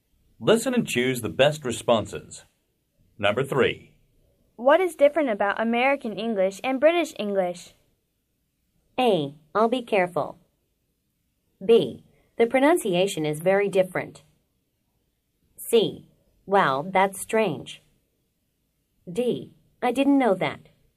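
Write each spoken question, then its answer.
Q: What is different about American English and British English?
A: B: The pronunciation is very different.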